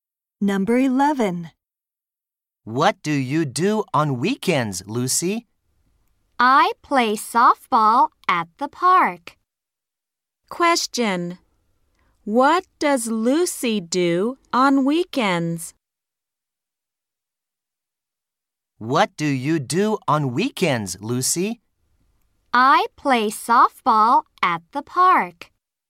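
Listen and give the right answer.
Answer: She plays softball at the park.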